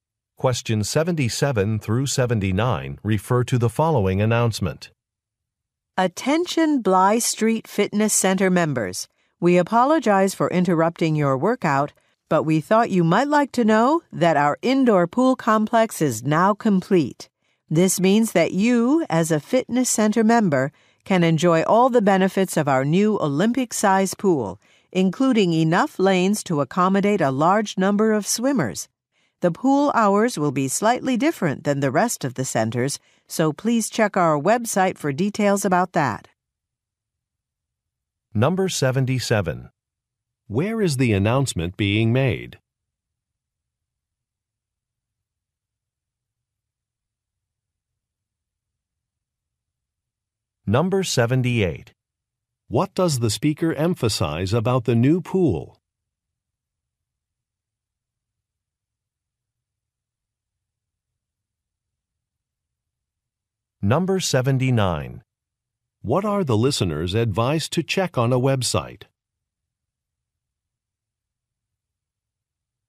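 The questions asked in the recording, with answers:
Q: Where is the announcement being made?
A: At a fitness center

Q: What does the speaker emphasize about the new pool?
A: It has enough lanes for many swimmers

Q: What are the listeners advised to check on a website?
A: The pool hours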